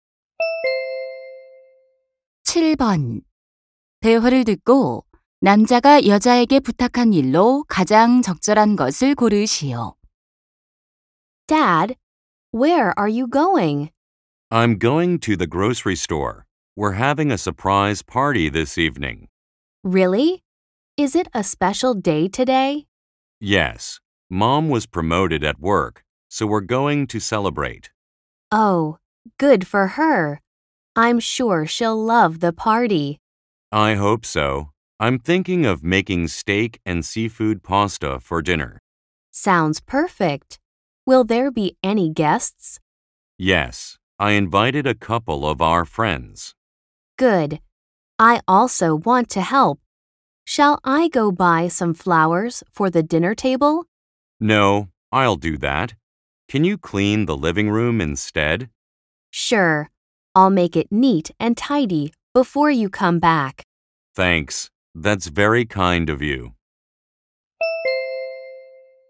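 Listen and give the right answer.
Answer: 거실 청소하기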